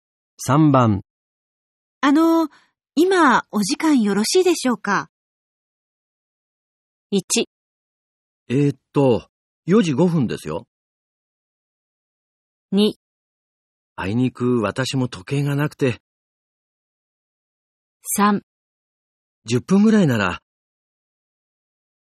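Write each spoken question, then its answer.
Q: 今お時間よろしいでしょうか?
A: 3: 10分ぐらいなら。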